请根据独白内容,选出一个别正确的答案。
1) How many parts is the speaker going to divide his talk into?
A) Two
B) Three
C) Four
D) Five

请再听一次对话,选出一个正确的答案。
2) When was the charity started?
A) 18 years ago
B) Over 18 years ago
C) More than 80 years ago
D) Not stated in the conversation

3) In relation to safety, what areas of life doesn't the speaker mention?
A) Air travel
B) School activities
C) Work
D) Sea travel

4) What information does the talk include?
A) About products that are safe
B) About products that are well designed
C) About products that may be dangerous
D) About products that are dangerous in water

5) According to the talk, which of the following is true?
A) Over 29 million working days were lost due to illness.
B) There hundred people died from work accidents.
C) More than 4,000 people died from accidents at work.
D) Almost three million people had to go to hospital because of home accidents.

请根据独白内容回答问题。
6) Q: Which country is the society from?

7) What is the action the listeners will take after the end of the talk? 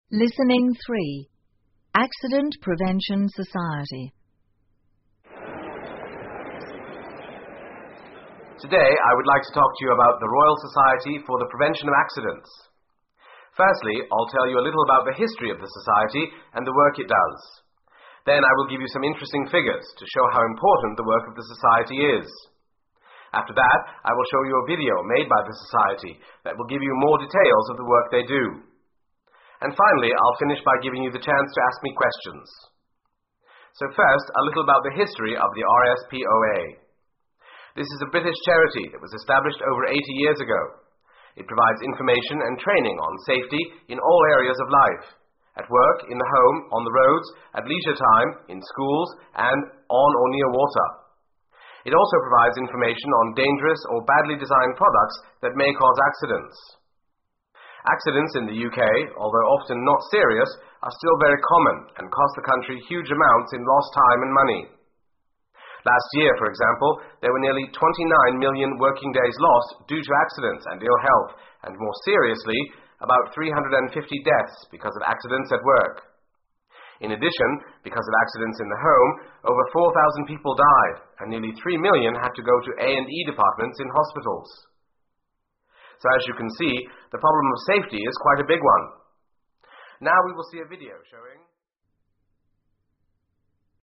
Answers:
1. Four
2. More than 80 years ago
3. Air travel
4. About products that may be dangerous
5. Almost three million people had to go to hospital because of home accidents.
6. UK
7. See a video

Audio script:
Today I would like to talk to you about The Royal Society for the Prevention of Accidents.
Firstly,I'll tell you a little about the history of the society and the work it does.Then I will give you
some interesting figures to show how important the work of the society is.After that,I will show
you a video made by the society that will give you more details of the work they do.And finally,I'll
finish by giving you the chance to ask me questions.
So first,a little about the history of the RSPoA.This is a British charity that was established over
80 years ago.It provides information and training on safety in all areas of life-at work,in the
home,on the roads,at leisure time,in schools,and on or near water.It also provides information on
dangerous or badly designed products that may cause accidents.
Accidents in the UK,although often not serious,are still very common and cost the country huge
amounts in lost time and money.Last year,for example,there were nearly 29 million working days
lost due to accidents and ill health,and more seriously,about 350 deaths because of accidents at
work.In addition,because of accidents in the home,over 4,000 people died and nearly three million
had to go to A&E departments in hospitals.
So as you can see,the problem of safety is quite a big one.Now we will see a video showing...

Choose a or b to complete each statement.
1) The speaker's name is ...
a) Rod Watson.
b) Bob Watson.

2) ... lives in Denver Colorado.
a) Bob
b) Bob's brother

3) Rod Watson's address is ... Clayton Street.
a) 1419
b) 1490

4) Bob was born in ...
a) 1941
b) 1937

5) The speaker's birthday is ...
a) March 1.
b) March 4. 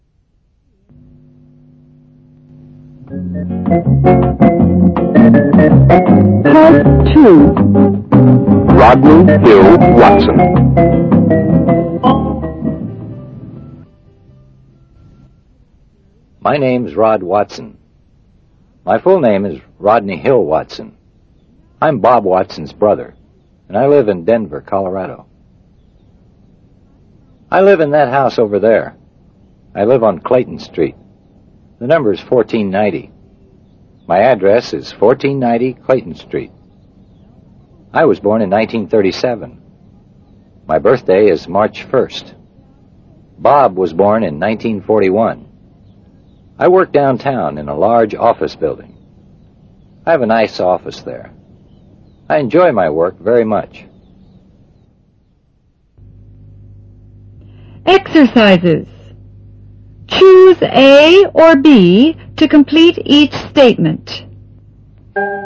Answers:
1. Rod Watson.
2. Bob's brother
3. 1490
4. 1941
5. March 1.

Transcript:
My full name is Rodney Hill Watson. I'm Bob Watson's brother, and I live in Denver, Colorado.
I live in that house overe there. I live on Clayton Street. The number is 1490. My address is 1490 Clayton Street. I was born in 1937. My birthday is March 1. Bob was born in 1941.
I work downtown in a large office building. I have a nice office there.

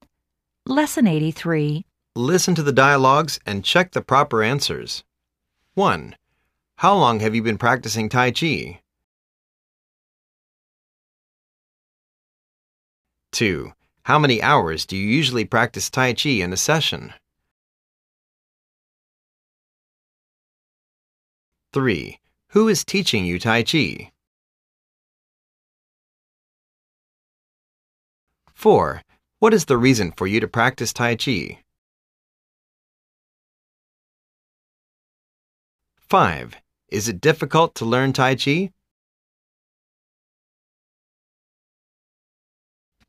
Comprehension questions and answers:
Listen to the dialogues and check the proper answers.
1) How long have you been practicing tai-chi?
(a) This is the third year l'm doing it.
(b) This is the third floor of the building.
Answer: This is the third year l'm doing it.

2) How many hours do you usually practice tai-chi in a session?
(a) Usually we do one and a half hourjogging for a session.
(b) Usually we do one and a half hour for a session.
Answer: Usually we do one and a half hour for a session.

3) Who is teaching you tai-chi?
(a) Mr. Chou who is a Yoga teacher of India.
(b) Mr. Chang who is a tai-chi trainer in the Asian Tai-Chi organization.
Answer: Mr. Chang who is a tai-chi trainer in the Asian Tai-Chi organization.

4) What is the reason for you to practice tai-chi?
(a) I started it because I had a serious backache a year ago.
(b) I bought it because l'm going to start a business.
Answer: I started it because I had a serious backache a year ago.

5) Is it difficult to learn tai-chi?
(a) Not at all. It takes you at least three years to understand it.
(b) Not at all. Patience is the key to learn it.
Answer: Not at all. Patience is the key to learn it.

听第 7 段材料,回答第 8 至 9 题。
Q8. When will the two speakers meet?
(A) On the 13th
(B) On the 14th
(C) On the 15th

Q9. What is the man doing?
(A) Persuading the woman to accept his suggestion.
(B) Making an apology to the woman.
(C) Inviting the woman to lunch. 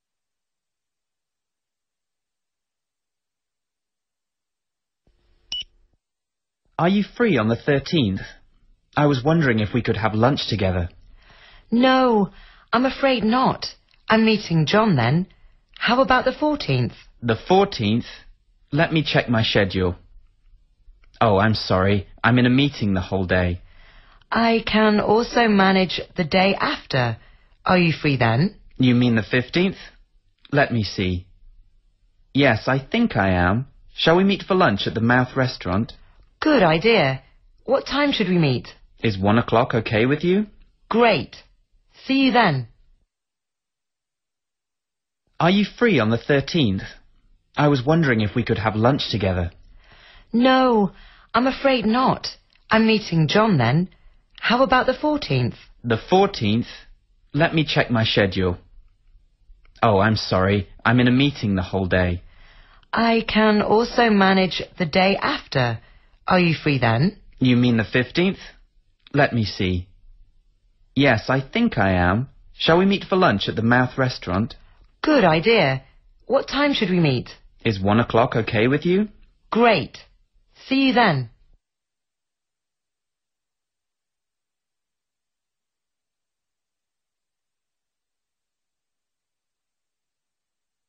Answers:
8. On the 15th
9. Inviting the woman to lunch.

